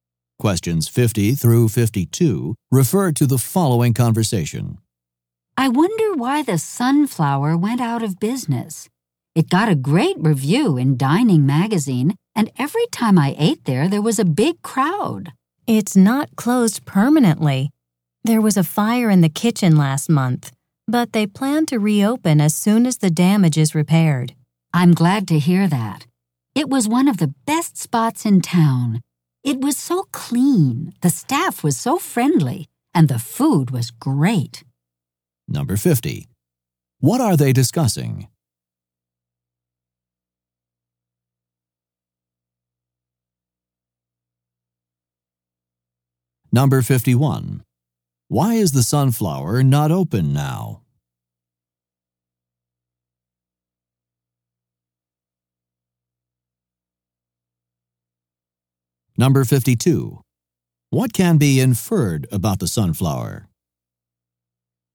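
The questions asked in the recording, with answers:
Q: What are they discussing?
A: A restaurant, the Sunflower

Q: Why is the sunflower not open now?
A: There was a fire in the kitchen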